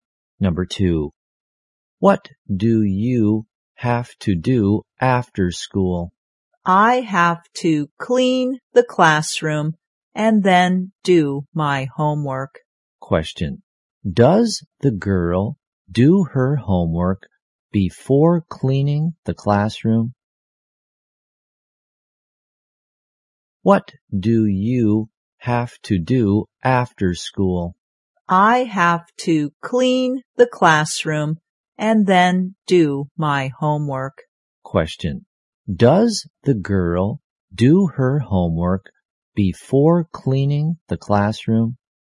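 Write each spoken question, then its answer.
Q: Does the girl do her homework before cleaning the classroom?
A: No, she cleans the classroom first.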